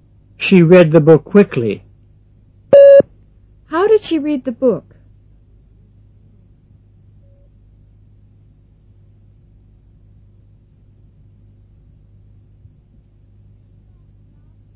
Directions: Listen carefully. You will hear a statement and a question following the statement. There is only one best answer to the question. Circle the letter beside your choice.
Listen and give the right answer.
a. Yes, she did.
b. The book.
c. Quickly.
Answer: c. Quickly.

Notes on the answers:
She read the book quickly.

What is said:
10.She read the book quickly. How did she read the book? (c)